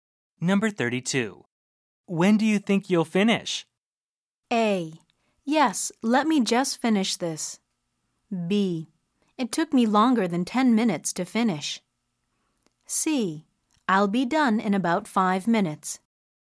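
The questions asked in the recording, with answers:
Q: When do you think you'll finish?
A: C: I'll be done in about 5 minutes.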